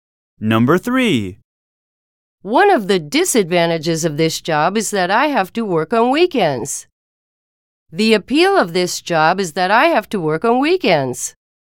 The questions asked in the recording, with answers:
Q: The appeal of this job is that I have to work on weekends.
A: Different is the correct answer.